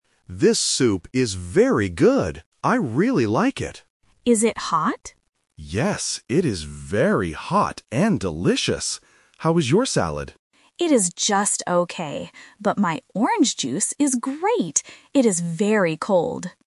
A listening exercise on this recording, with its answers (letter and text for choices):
Listen to the conversation between two people at a restaurant. Choose the correct answer (A, B, or C).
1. What does David say about the soup?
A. It is cold.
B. It is very hot.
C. It is just okay.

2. What food is Anna eating?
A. Salad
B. Soup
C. Bread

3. How is the orange juice?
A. Just okay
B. Very hot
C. Very cold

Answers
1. B. It is very hot.
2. A. Salad
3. C. Very cold

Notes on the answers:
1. David says the soup is "very good", and when Anna asks if it is hot, he answers, "Yes, it is very hot and delicious." Why the trap is wrong: Option A (cold) and Option C (just okay) are traps. These adjectives are used in the audio, but they describe the orange juice and the salad, not the soup.
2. David asks Anna, "How is your salad?" and she answers him. This means she is eating a salad. Why the trap is wrong: Option B (Soup) is a trap because the soup is mentioned, but David is the one eating it, not Anna. Option C (Bread) is plausible in a restaurant but is not mentioned at all.
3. Anna clearly states, "my orange juice is great! It is very cold." Why the trap is wrong: Option A (Just okay) is a trap because Anna uses "just okay" to describe her salad, not her drink. Option B (Very hot) is a trap because David uses "hot" to describe his soup.

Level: A1